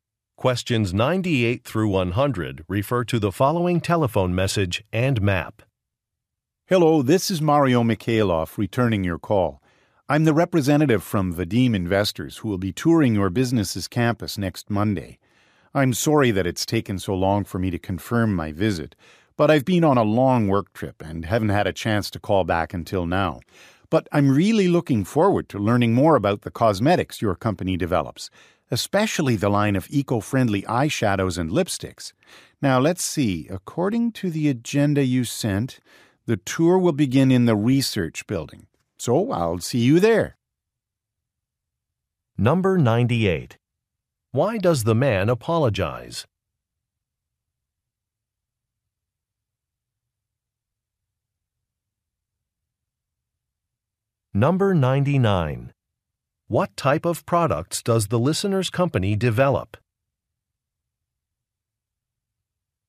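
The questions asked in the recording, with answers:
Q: Why does the man apologize?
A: He took a long time to confirm his visit

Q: What type of products does the listener's company develop?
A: Cosmetics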